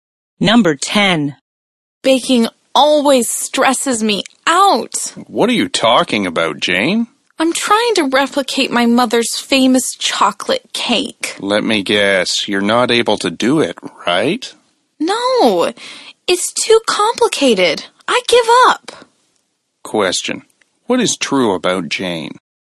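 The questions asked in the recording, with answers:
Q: What is true about Jane?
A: She can't replicate her mother's chocolate cake and gives up.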